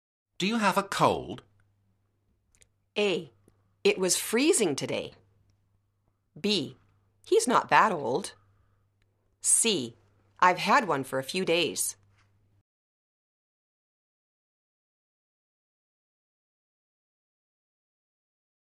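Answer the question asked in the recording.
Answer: C: I've had one for a few days.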